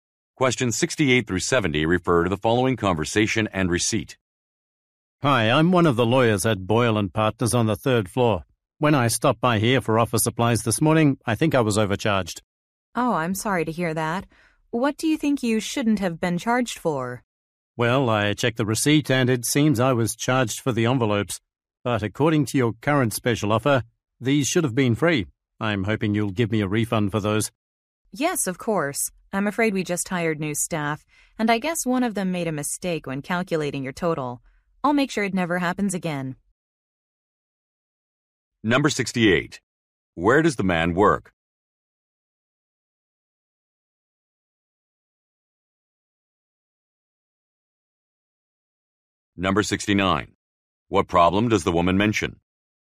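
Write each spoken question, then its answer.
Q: What problem does the woman mention?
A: She was charged for envelopes that should have been free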